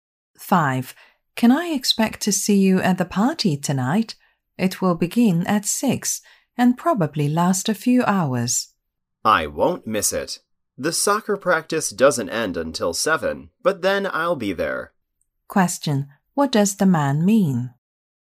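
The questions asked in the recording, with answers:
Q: What does the man mean?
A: He will come to the party, but late, after soccer practice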